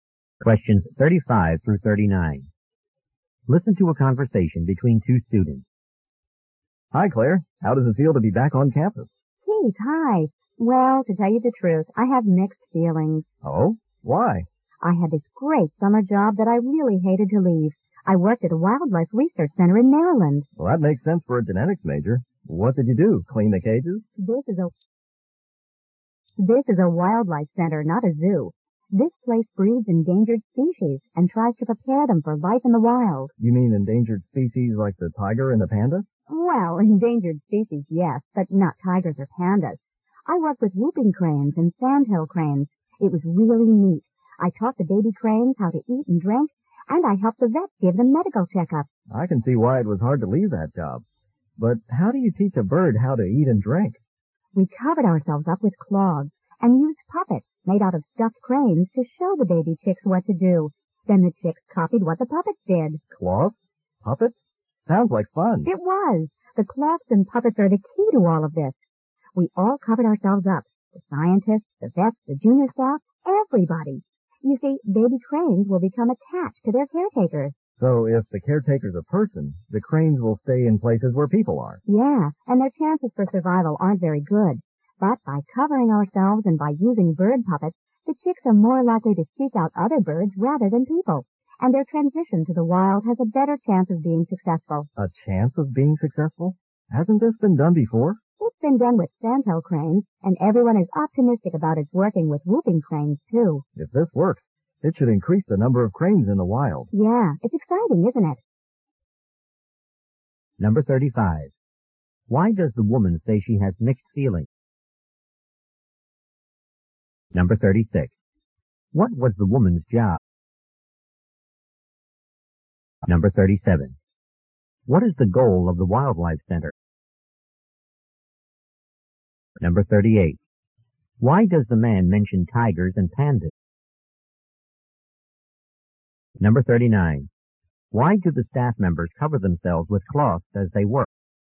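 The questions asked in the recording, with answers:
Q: Why does the woman say she has mixed feelings?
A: She was sorry to leave her summer job.

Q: What was the woman's job?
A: She cared for baby cranes at a wildlife research center.

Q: What is the goal of the Wildlife Center?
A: To breed endangered species and prepare them for life in the wild.

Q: Why does the man mention tigers and pandas?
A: As examples of endangered species.

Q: Why do the staff members cover themselves with cloths as they work?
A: So the chicks attach to birds rather than to people.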